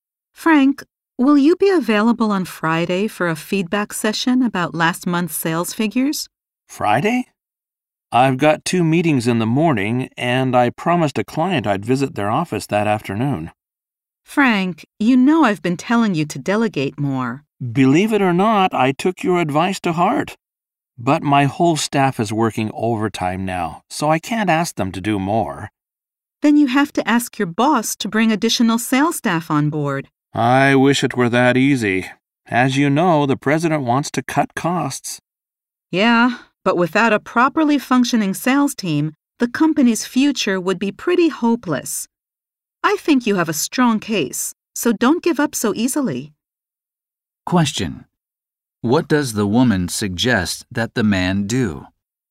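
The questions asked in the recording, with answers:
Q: Question: What does the woman suggest that the man do?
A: Ask his boss to hire more sales staff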